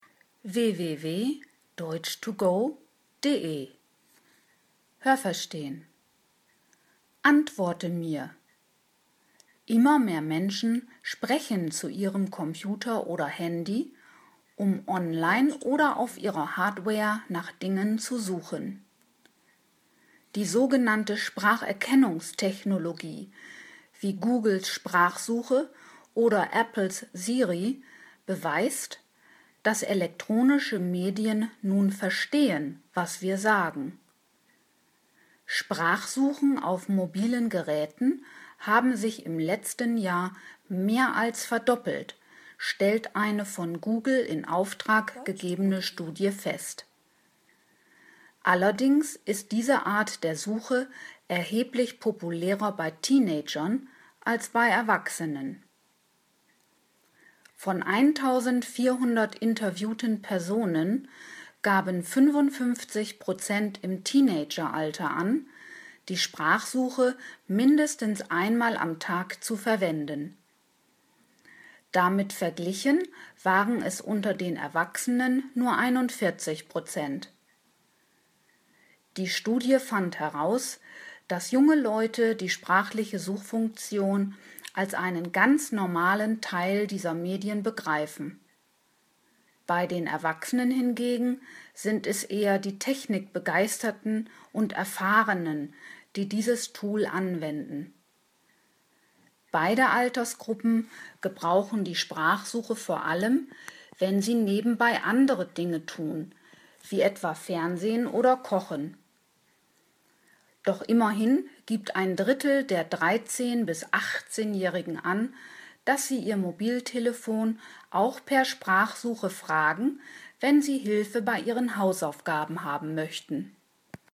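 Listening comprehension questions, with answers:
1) Sprachsuchen sind im letzten Jahr um mehr als 50 % gestiegen.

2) Alle Altersgruppen nutzen die Sprachsuche gleichermaßen.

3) An der von Google beauftragten Studie nahmen 2400 Personen teil.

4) Mehr als die Hälfte der Befragten im Teenageralter gab an, die Sprachsuche mindestens einmal am Tag zu verwenden.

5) Etwa 40 % der Erwachsenen nutzen die Sprachsuche nie.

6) Auch für Teenager stellt die Sprachsuche noch etwas Besonderes dar.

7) Sowohl junge als auch erwachsene Leute nutzen die Sprachfunktion eher nebenbei, also wenn sie noch andere Dinge tun.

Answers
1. richtig
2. falsch
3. falsch
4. richtig
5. falsch
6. falsch
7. richtig

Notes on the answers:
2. Sie ist bei Teenagern populärer als bei Erwachsenen.
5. 41 % der Erwachsenen gaben an, diese Suchfunktion mindestens einmal am Tag aufzurufen.
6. Sie begreifen die Funktion als normales Feature ihrer Medien.

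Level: C (schwer)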